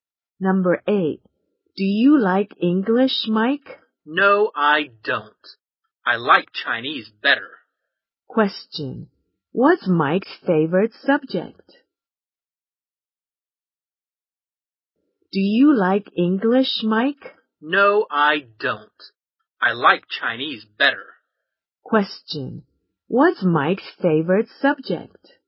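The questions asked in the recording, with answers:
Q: What's Mike's favorite subject?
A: Chinese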